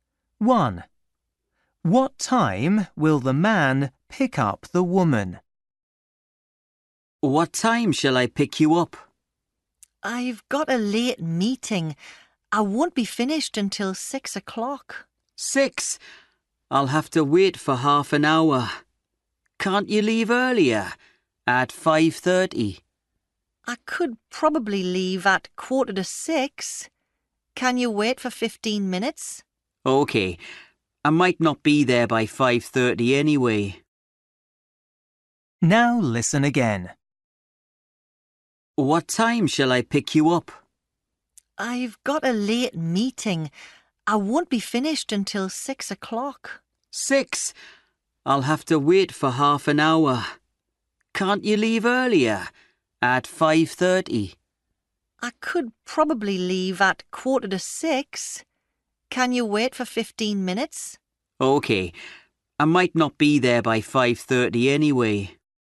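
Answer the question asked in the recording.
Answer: 5:45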